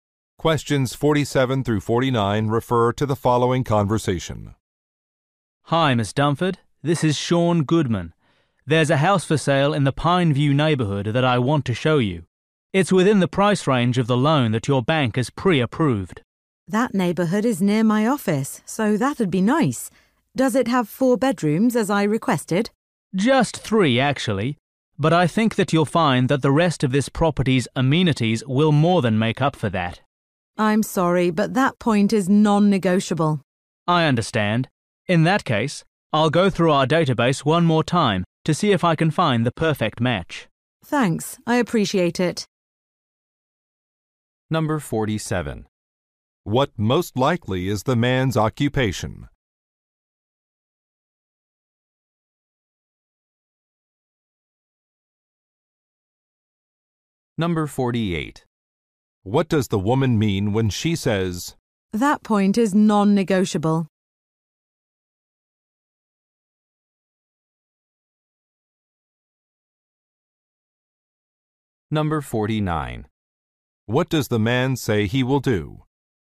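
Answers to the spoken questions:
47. Real estate agent
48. She must have four bedrooms
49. Search the database again for a match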